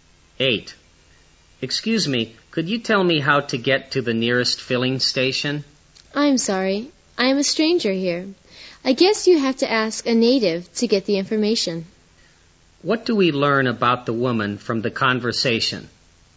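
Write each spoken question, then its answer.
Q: What do we learn about the woman from the conversation?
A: She is a stranger there and doesn't know the way.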